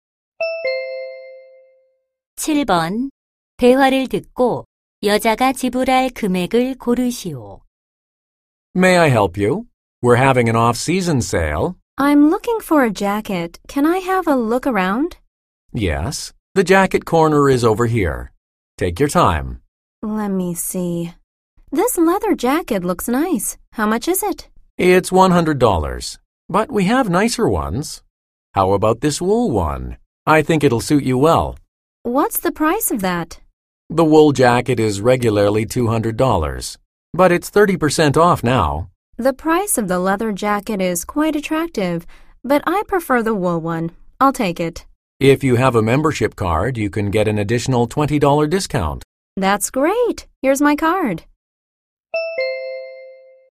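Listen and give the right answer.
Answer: 120달러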